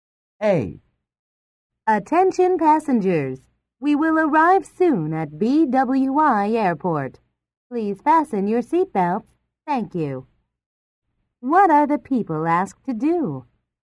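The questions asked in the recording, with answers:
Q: What are the people asked to do?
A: Fasten their seatbelts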